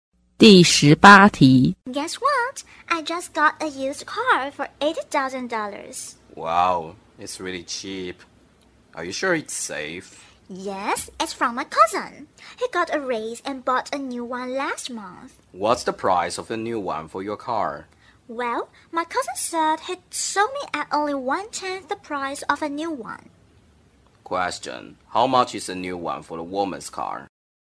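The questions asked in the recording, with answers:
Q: Question. How much is a new one for the woman's car?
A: $800,000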